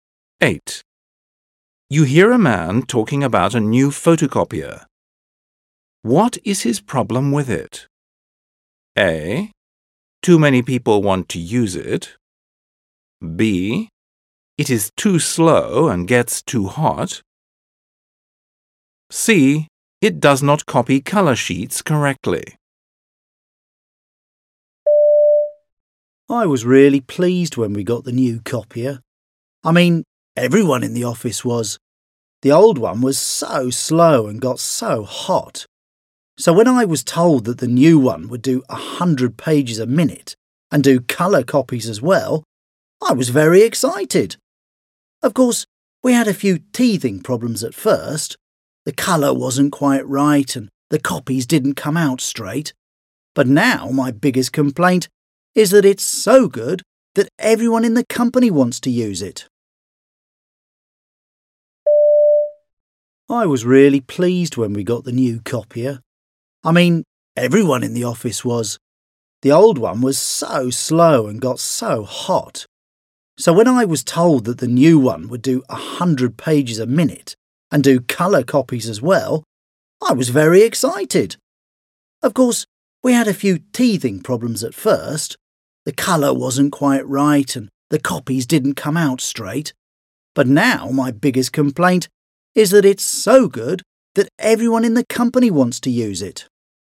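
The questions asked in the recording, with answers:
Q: What is his problem with it?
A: A: Too many people want to use it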